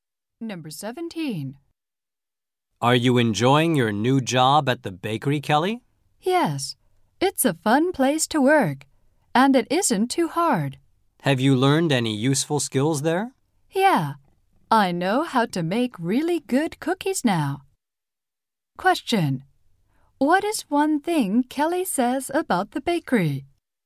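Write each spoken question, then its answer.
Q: Question. What is one thing Kelly says about the bakery?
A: It's a fun place to work.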